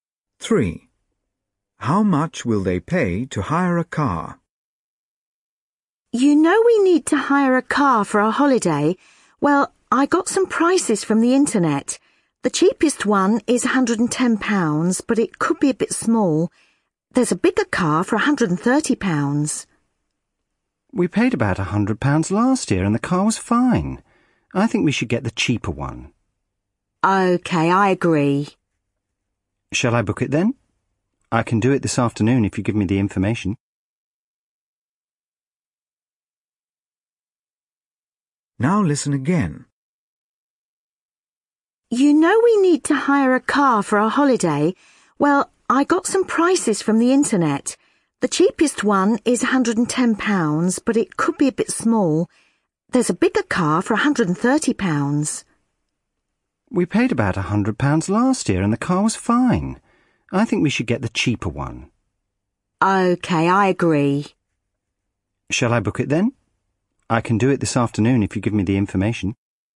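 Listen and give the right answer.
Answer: £110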